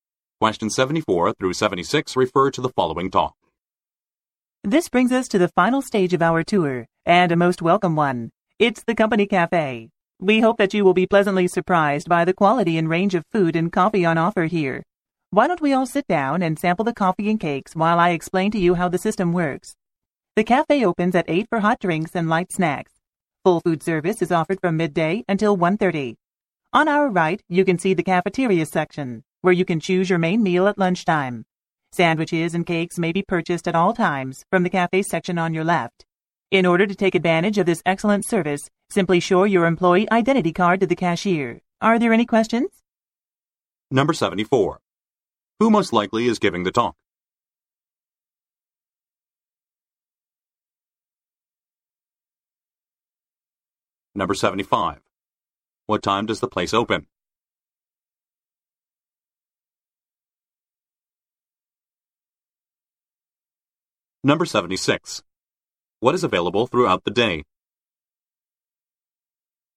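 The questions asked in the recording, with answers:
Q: What time does the place open?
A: At 8

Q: What is available throughout the day?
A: Sandwiches and cakes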